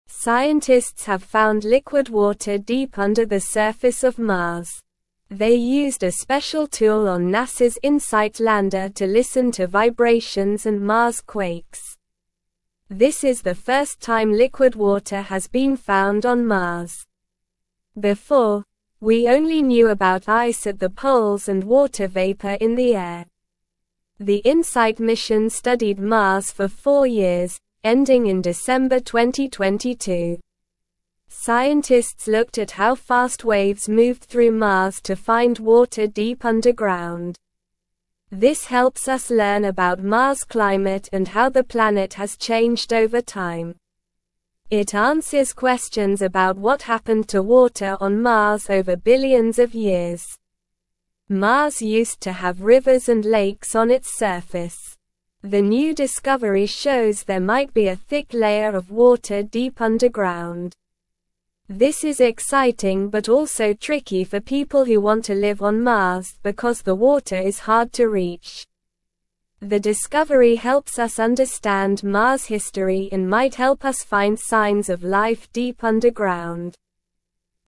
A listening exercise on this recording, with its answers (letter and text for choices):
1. What did scientists find deep under the surface of Mars?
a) Gold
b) Diamonds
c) Liquid water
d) Oil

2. How did scientists listen to vibrations and Mars quakes on Mars?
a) Using a telescope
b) Using a submarine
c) Using a drone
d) Using a special tool on NASA's Insight lander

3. How long did the Insight mission study Mars?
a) One month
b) Four years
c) Ten years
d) One week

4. What did scientists find on Mars before discovering liquid water?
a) Volcanoes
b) Ice at the poles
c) Sand dunes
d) Forests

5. What did Mars have on its surface in the past?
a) Rivers and lakes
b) Deserts only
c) Mountains only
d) Swamps only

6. Why is the discovery of liquid water on Mars exciting but tricky for people who want to live there?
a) Water is too hot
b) Water is too cold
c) Water is hard to reach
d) Water is contaminated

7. What does the discovery of water deep underground on Mars help us understand?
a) The Moon's history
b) Earth's history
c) Venus' history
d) Mars' history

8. What might the discovery of water on Mars help us find signs of?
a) Life deep underground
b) Aliens on the surface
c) Ancient civilizations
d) Hidden treasure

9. Scientists have (1)______ liquid water deep under the (2)______ of (3)______.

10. Scientists have (1)______ liquid water deep under the (2)______ of (3)______.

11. Scientists have (1)______ liquid water deep under the (2)______ of (3)______.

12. Scientists looked at how (4)______ waves moved through Mars to find water deep underground.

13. This (5)______ us (6)______ about Mars' climate and how the planet has changed over time.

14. This (5)______ us (6)______ about Mars' climate and how the planet has changed over time.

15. It answers questions about what (7)______ to (8)______ on Mars over billions of years.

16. It answers questions about what (7)______ to (8)______ on Mars over billions of years.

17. Mars used to (9)______ rivers and lakes on its surface.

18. This is exciting but also (10)______ for people who want to (11)______ on Mars because the water is hard to reach.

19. This is exciting but also (10)______ for people who want to (11)______ on Mars because the water is hard to reach.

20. The discovery helps us understand Mars' (12)______ and might help us find signs of life deep underground.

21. Liquid water has been found deep under the surface of Mars.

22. This is not the first time liquid water has been found on Mars.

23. The Insight mission studied Mars for four years and ended in December 2022.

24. Before this discovery, we knew about liquid water on Mars, not just ice at the poles and water vapor in the air.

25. The discovery of water deep underground helps us understand Mars' history and might lead to finding signs of life.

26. Scientists used a common tool on NASA's Insight lander to make this discovery.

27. Scientists ignored vibrations and Mars quakes to find the liquid water.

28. Mars used to have rivers and lakes on its surface.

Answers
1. c) Liquid water
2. d) Using a special tool on NASA's Insight lander
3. b) Four years
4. b) Ice at the poles
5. a) Rivers and lakes
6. c) Water is hard to reach
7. d) Mars' history
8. a) Life deep underground
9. found
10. surface
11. Mars
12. fast
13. helps
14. learn
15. happened
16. water
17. have
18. tricky
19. live
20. history
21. True
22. False
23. True
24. False
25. True
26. False
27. False
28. True

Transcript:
Scientists have found liquid water deep under the surface of Mars. They used a special tool on NASA's Insight lander to listen to vibrations and Mars quakes. This is the first time liquid water has been found on Mars. Before, we only knew about ice at the poles and water vapor in the air.
The Insight mission studied Mars for four years, ending in December 2022. Scientists looked at how fast waves moved through Mars to find water deep underground. This helps us learn about Mars' climate and how the planet has changed over time. It answers questions about what happened to water on Mars over billions of years.
The new discovery shows there might be a thick layer of water deep underground. This is exciting but also tricky for people who want to live on Mars because the water is hard to reach. The discovery helps us understand Mars' history and might help us find signs of life deep underground.

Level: Level 2